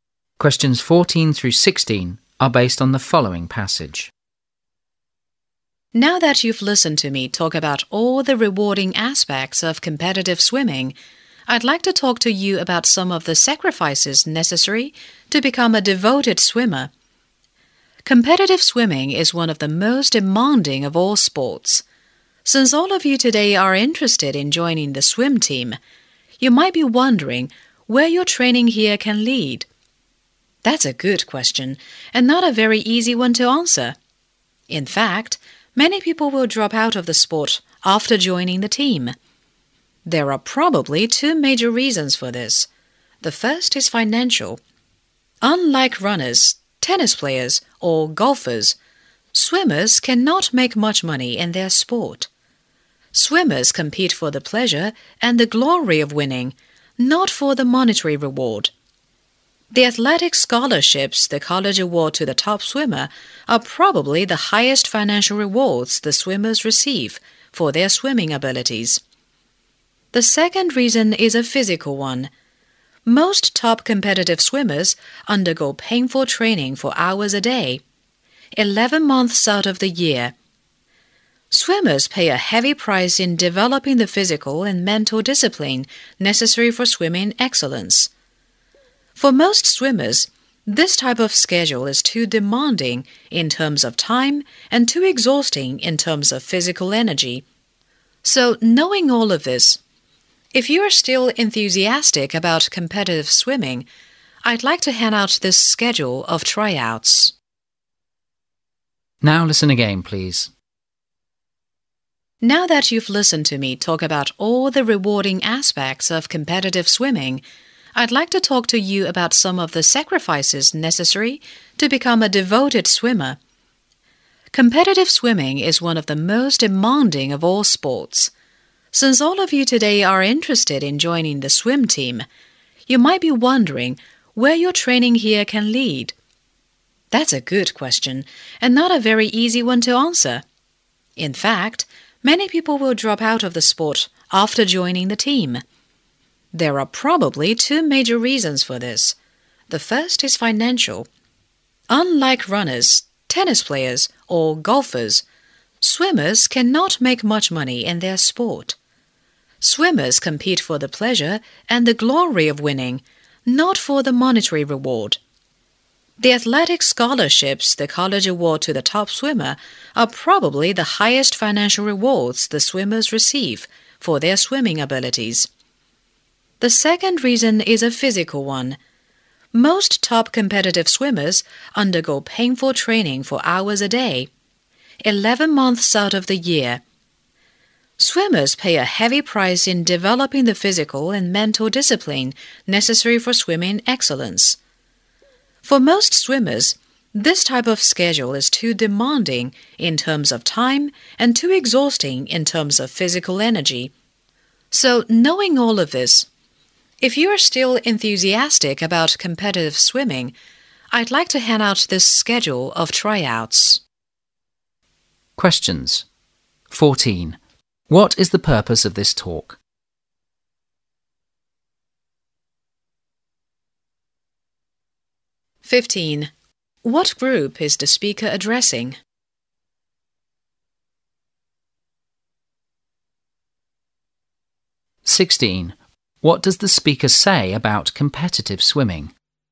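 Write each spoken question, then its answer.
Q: What group is the speaker addressing?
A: People interested in joining the swim team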